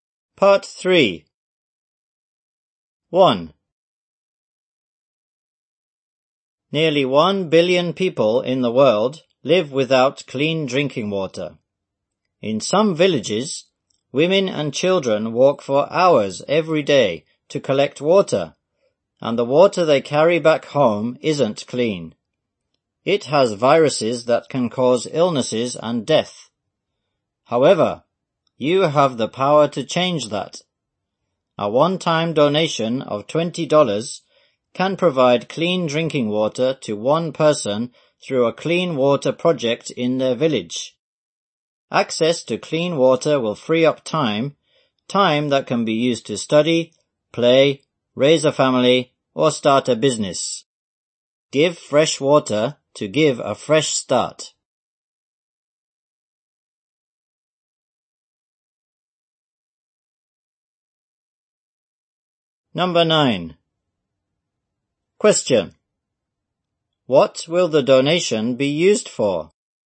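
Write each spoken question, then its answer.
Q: What will the donation be used for?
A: Providing clean drinking water through a village water project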